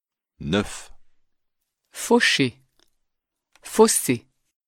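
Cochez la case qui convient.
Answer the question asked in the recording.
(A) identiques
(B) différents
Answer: (B) différents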